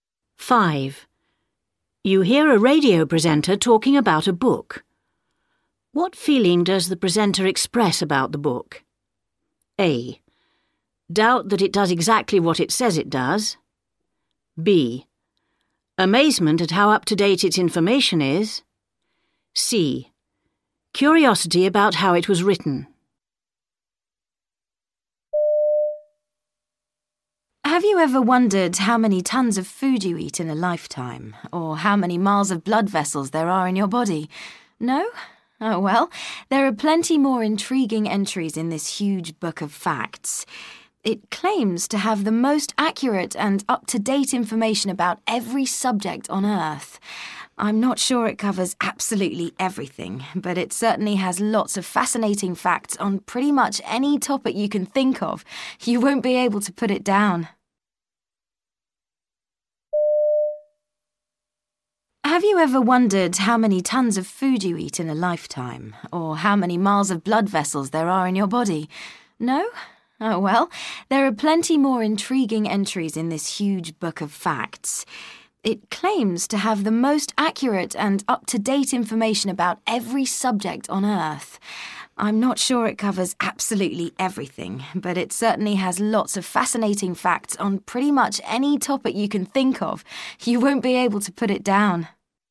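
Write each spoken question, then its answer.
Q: What feeling does the presenter express about the book?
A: A: Doubt that it does exactly what it says it does.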